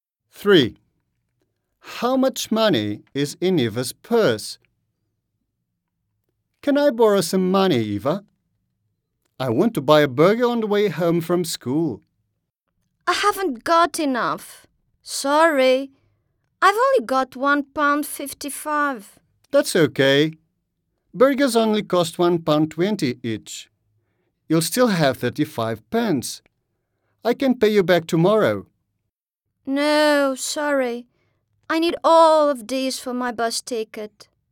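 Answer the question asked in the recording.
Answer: £1.55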